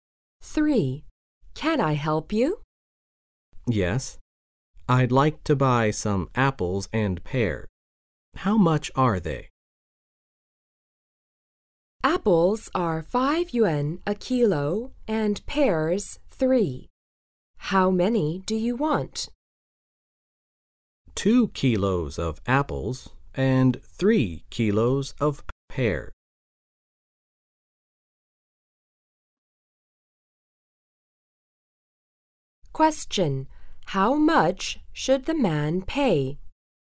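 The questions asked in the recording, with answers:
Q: How much should the man pay?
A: 19 yuan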